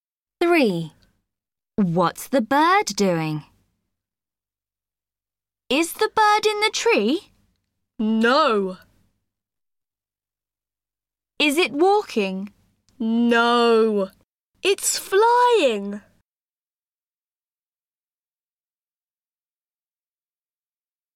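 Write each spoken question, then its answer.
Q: What's the bird doing?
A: It's flying.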